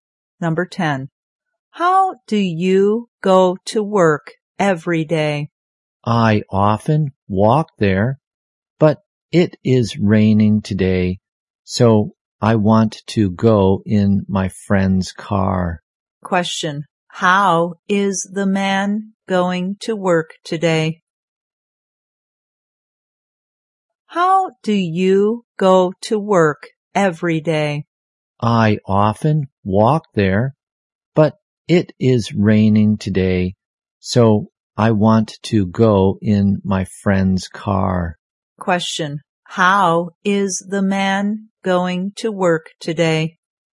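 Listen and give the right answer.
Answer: In his friend's car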